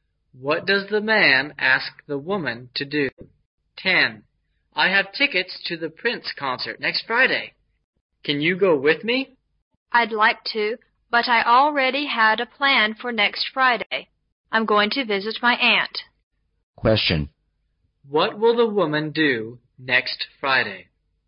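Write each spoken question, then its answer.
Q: What will the woman do next Friday?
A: Visit her aunt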